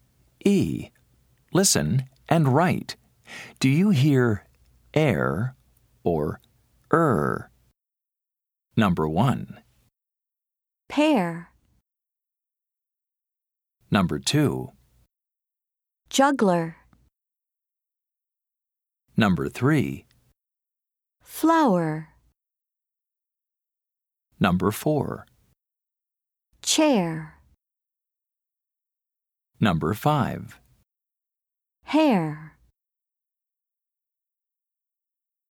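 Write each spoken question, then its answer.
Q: Juggler.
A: er

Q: Flower.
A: er

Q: Chair.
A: air

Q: Hare.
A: air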